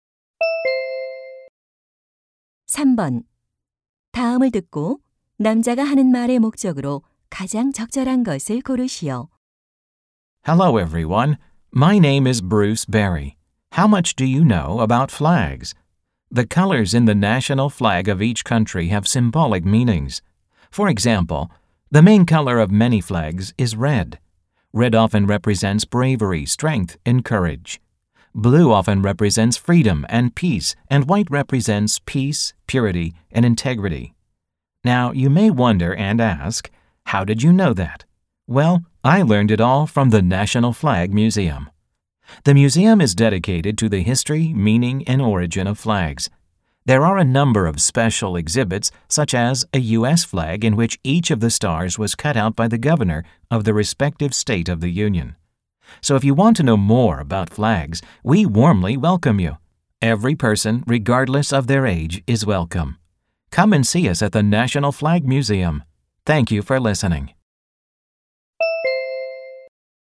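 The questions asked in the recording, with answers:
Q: 다음을 듣고 남자가 하는 말의 목적으로 가장 적절한 것을 고르시오.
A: 국기 박물관 방문을 홍보하려고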